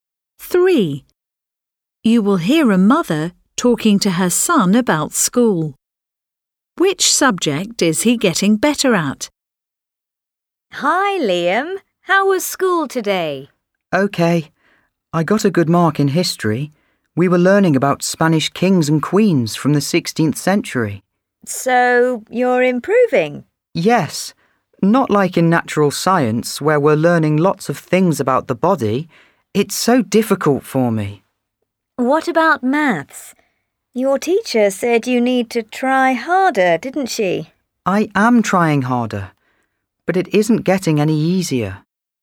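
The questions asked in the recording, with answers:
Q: Which subject is he getting better at?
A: History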